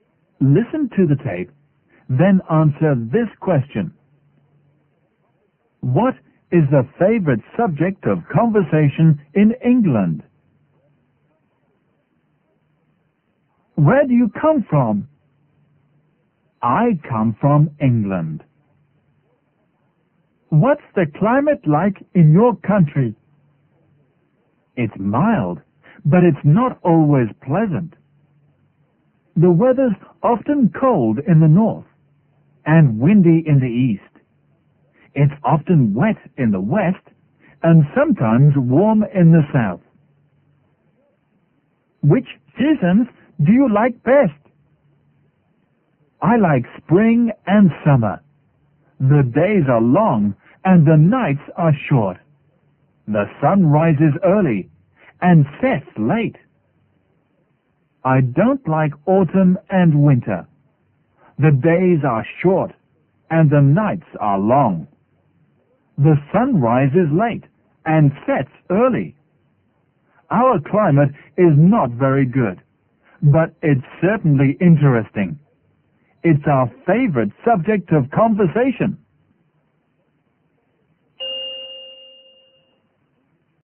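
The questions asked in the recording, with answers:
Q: What is the favorite subject of conversation in England?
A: The climate (the weather)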